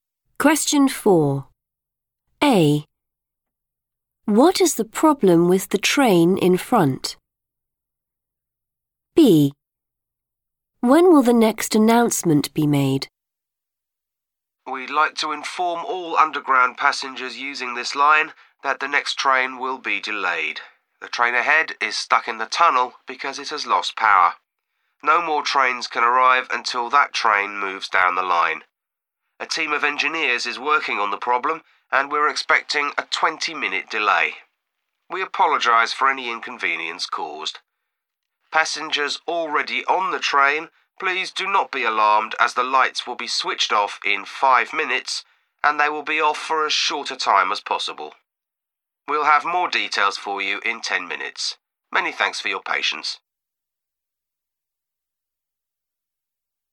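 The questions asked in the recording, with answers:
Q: What is the problem with the train in front?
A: it has lost power

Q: When will the next announcement be made?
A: in 10 minutes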